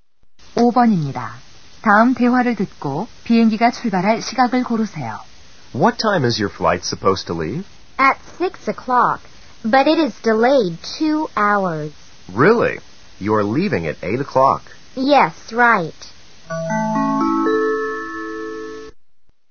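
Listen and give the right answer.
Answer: 8시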